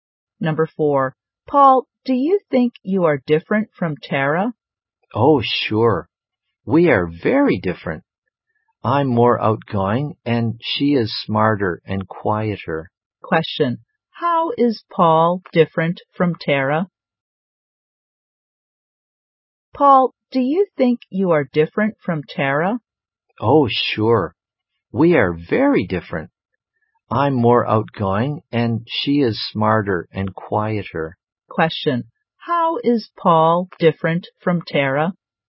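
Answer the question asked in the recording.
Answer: He is more outgoing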